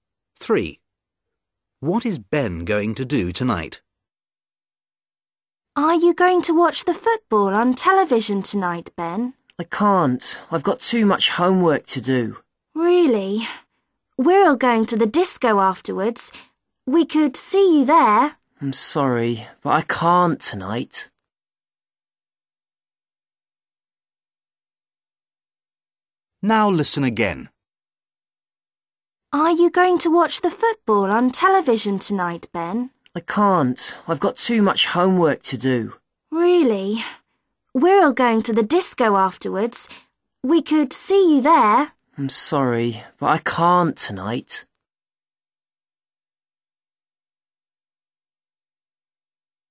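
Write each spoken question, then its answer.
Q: What is Ben going to do tonight?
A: Do his homework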